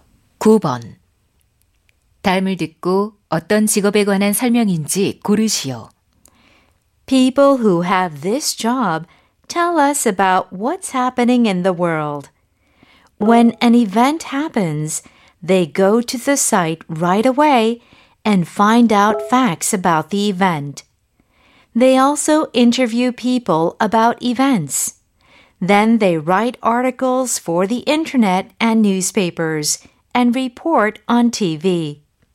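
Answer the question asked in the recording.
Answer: 기자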